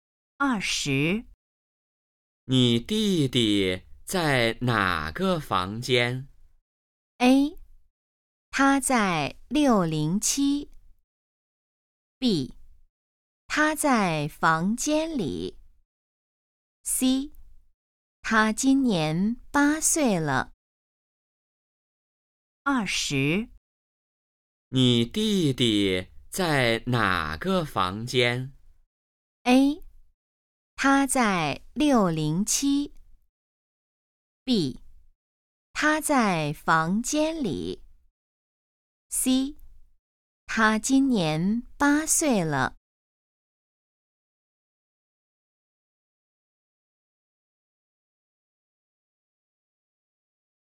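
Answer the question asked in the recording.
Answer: A: 他在607。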